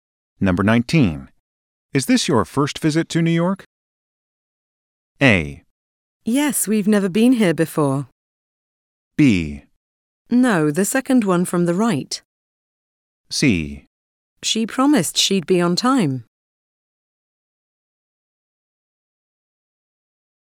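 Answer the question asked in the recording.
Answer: A: Yes, we've never been here before.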